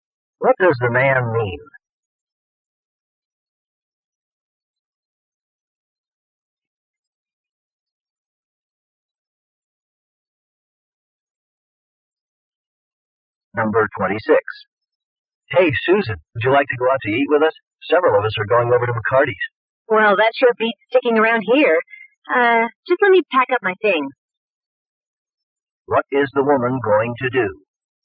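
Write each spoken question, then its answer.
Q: What is the woman going to do?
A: Go out to eat with them.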